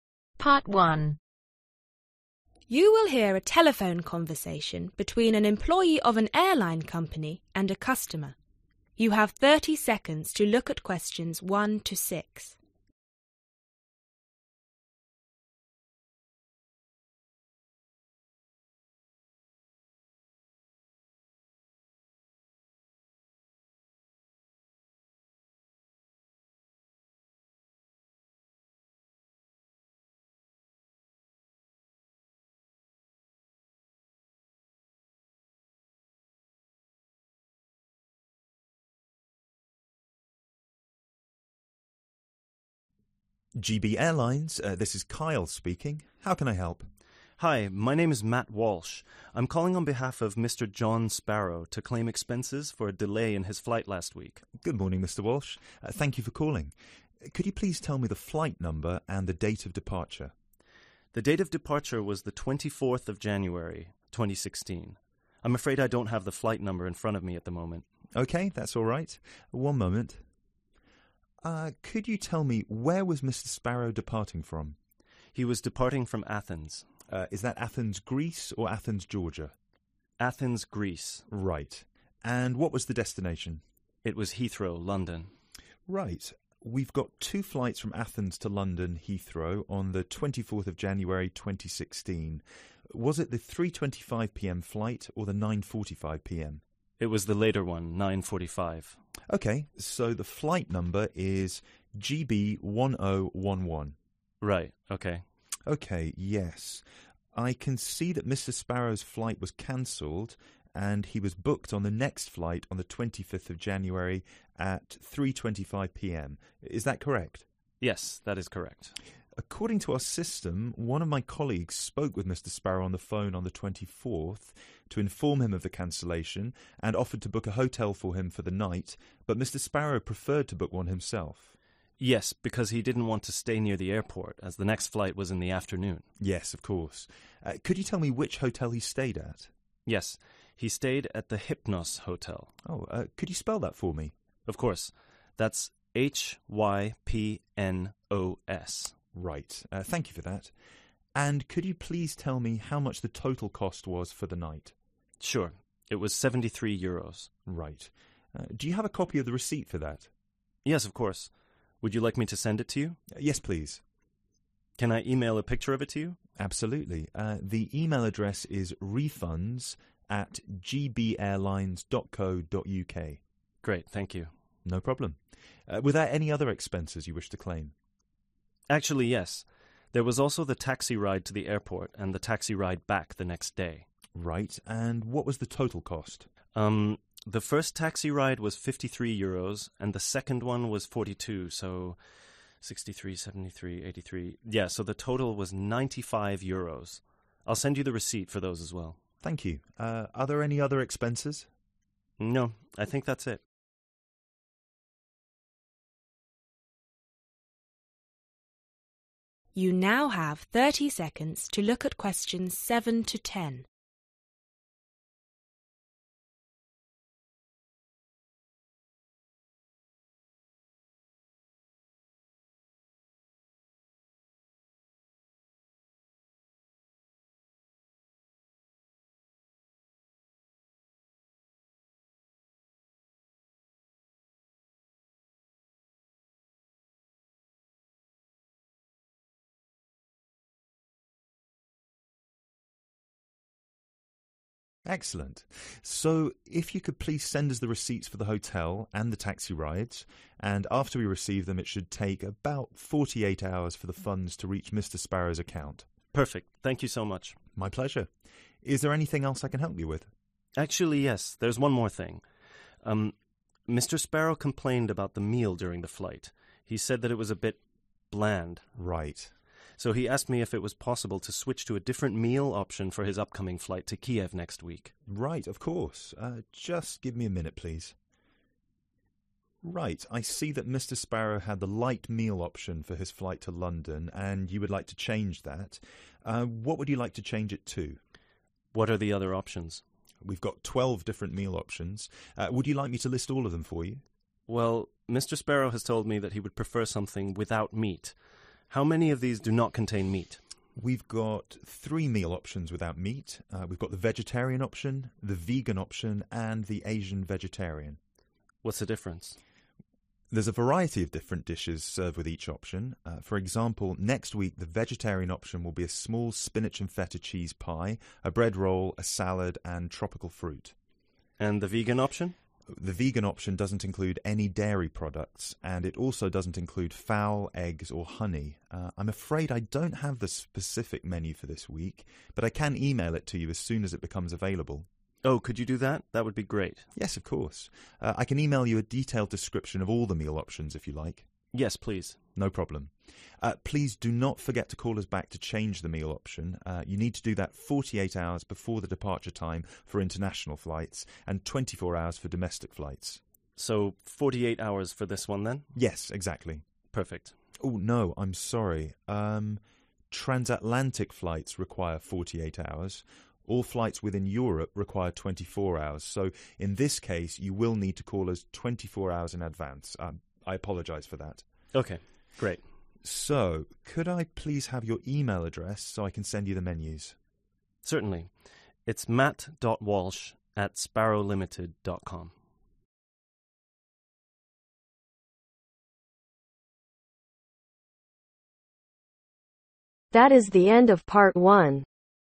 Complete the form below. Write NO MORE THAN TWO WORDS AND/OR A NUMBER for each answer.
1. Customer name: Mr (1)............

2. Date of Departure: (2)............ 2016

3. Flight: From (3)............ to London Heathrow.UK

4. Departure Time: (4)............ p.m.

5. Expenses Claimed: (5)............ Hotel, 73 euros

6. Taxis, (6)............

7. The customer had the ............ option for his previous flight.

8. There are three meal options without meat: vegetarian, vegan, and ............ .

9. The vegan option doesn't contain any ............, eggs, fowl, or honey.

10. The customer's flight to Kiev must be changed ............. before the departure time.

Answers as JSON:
{"1": "John Sparrow", "2": "24th January", "3": "Athens, Greece", "4": "9.45", "5": "Hypnos", "6": "95 euros", "7": "Light meal", "8": "Asian vegetarian", "9": "Dairy products", "10": "24 hours"}